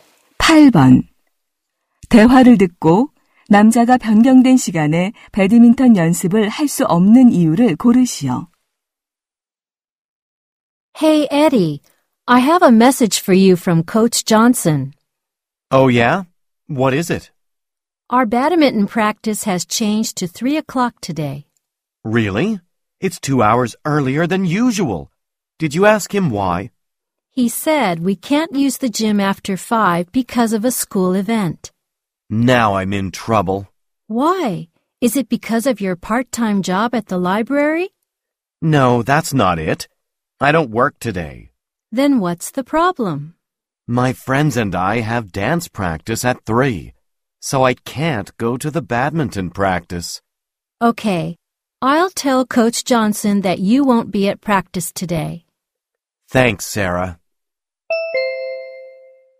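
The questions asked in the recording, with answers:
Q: 대화를 듣고 남자가 변경된 시간에 배드민턴 연습을 할 수 없는 이유를 고르시오.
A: 친구들과 춤 연습이 있어서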